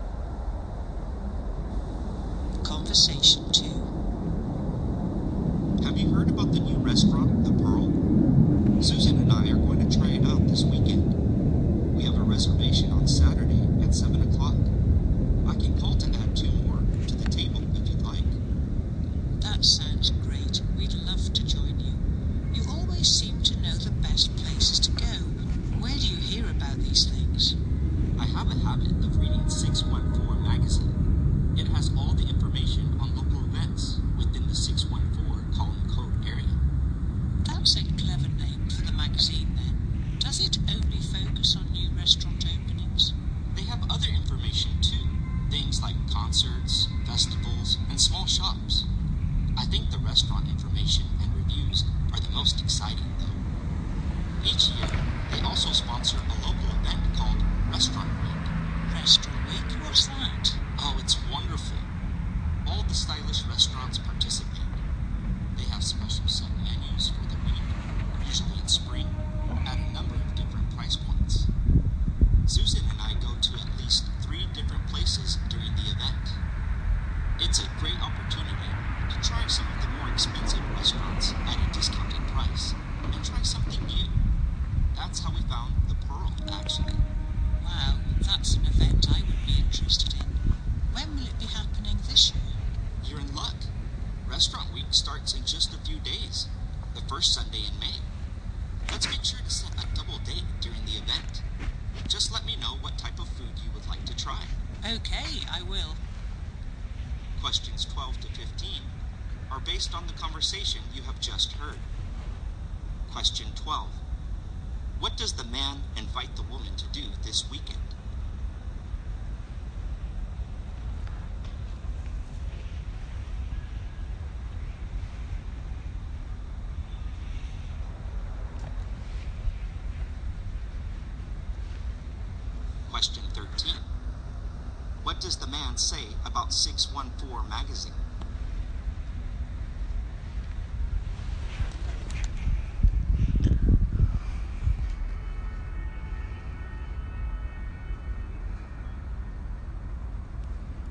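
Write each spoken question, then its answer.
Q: What does the man invite the woman to do this weekend?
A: Join him and Susan for dinner at the new restaurant, The Pearl.

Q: What does the man say about 614 magazine?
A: It has information on local events in the 614 area code.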